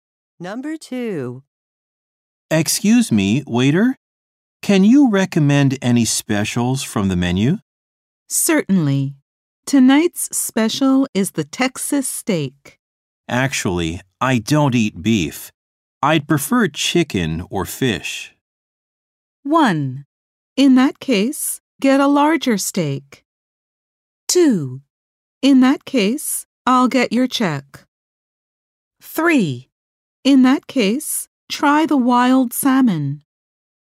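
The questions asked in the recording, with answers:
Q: I'd prefer chicken or fish.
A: 3: In that case, try the wild salmon.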